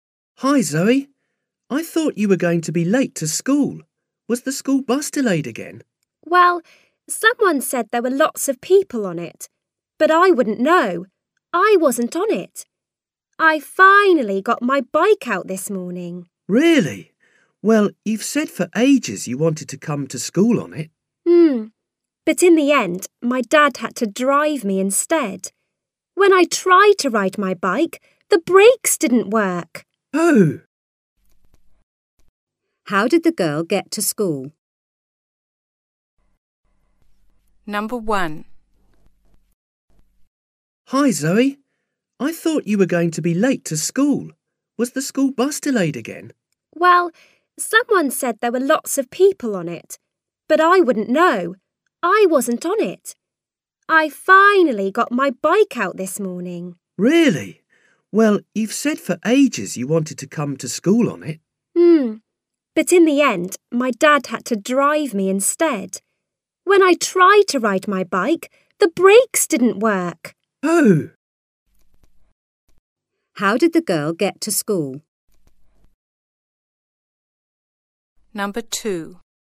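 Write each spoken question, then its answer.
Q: How did the girl get to school?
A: Her dad drove her by car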